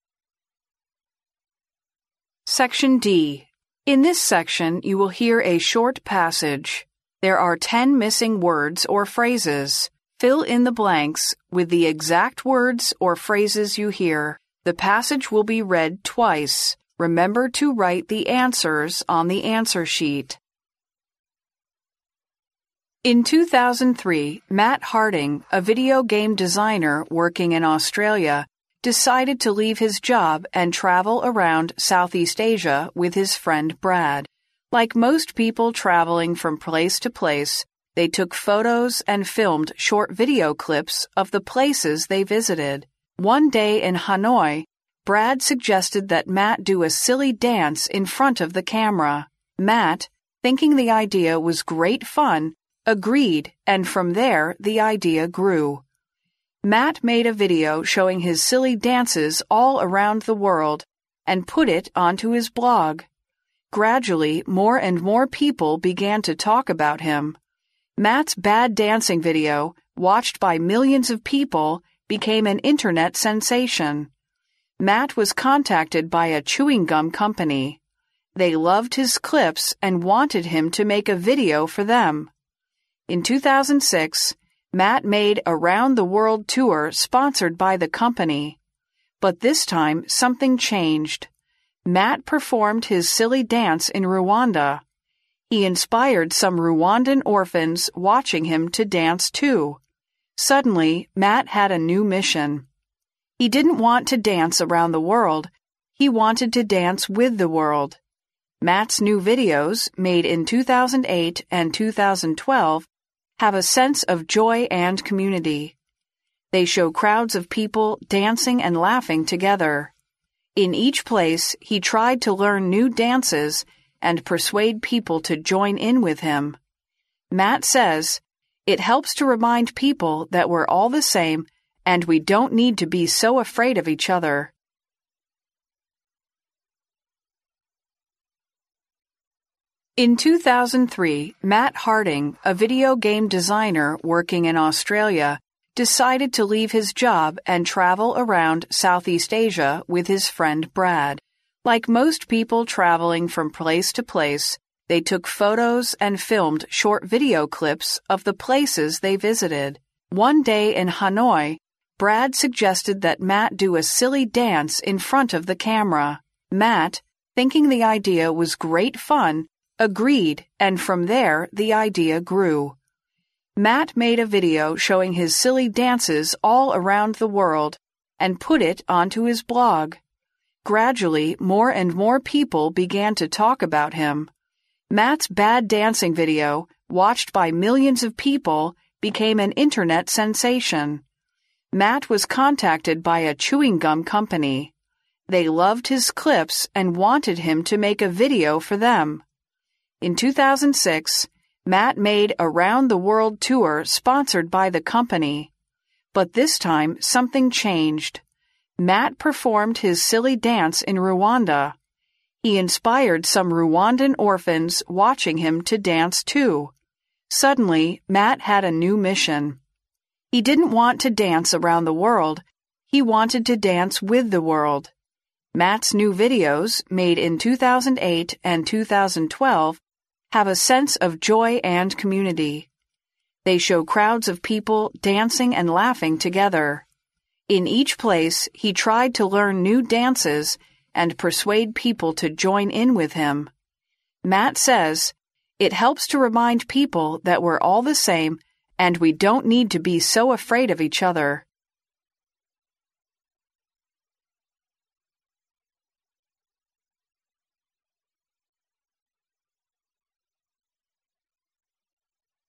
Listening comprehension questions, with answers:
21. Like most people travelling (21) _____, they took photos and filmed short video clips of the places they visited.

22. One day in Hanoi, Brad suggested that Matt do a silly dance (22) _____ the camera.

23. Matt, thinking the idea was (23) _____, agreed and from there, the idea (24) _____.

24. Matt, thinking the idea was (23) _____, agreed and from there, the idea (24) _____.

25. (25)_____, more and more people began to talk about him.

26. Matt's bad dancing video, watched by (26) ______ people, became an Internet sensation.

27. Matt was (27) _____ by a chewing gum company.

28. He inspired some Rwandan (28) _____ watching him to dance, too.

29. Matt's new videos, made in 2008 and 2012, have a sense of (29) _____.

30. In each place, he tried to learn new dances and persuade people to (30) _____ with him.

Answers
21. from place to place
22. in front of
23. great fun
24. grew
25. Gradually
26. millions of
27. contacted
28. orphans
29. joy and community
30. join in

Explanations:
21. 根据录音,此处表示到处去旅游。from place to place各处,到处。
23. 空格处位于was的后面作表语,表示Matt对这个主意的想法或态度。根据录音,空格处填入great fun,表示"很有趣"。
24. 分析本句句子结构可知,本句缺少谓语动词,因此空格处应该填入动词作谓语。根据录音,这里填入grew,表示想法"不断成熟"。注意使用了grow的过去式。
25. 根据录音,空格处填入副词Gradually,意思为"渐渐地"。注意首字母大写。
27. 根据录音,本句意思为"一个口香糖公司联系了Matt"。空格处与前面was构成被动语态,填入contacted。注意这里使用了动词contact的过去分词形式。
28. 根据录音,这里表示"卢旺达的孤儿",因此填入orphans,注意使用了名词的复数形式。
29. 根据录音,这里表示一种"欢乐和社团"的感觉。填入joy and community。
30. 空格处与前面的to一起构成不定式,persuade sb. to do sth.说服某人做某事。根据录音,这里表示说服人们加入他。空格处填入join in。

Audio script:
In 2003, Matt Harding, a video game designer working in Australia, decided to leave his job and travel around Southeast Asia with his friend Brad. Like most people travelling from place to place, they took photos and filmed short video clips of the places they visited. One day in Hanoi, Brad suggested that Matt do a silly dance in front of the camera. Matt, thinking the idea was great fun, agreed and from there, the idea grew. Matt made a video showing his silly dances all around the world and put it onto his blog. Gradually, more and more people began to talk about him. Matt's bad dancing video, watched by millions of people, became an Internet sensation. Matt was contacted by a chewing gum company. They loved his clips and wanted him to make a video for them. In 2006, Matt made a round-the-world tour sponsored by the company. But this time, something changed. Matt performed his silly dance in Rwanda. He inspired some Rwandan orphans watching him to dance, too. Suddenly, Matt had a new mission. He didn't want to dance around the world, he wanted to dance with the world. Matt's new videos, made in 2008 and 2012, have a sense of joy and community. They show crowds of people dancing and laughing together. In each place, he tried to learn new dances and persuade people to join in with him. Matt says, "It helps to remind people that we're all the same and we don't need to be so afraid of each other."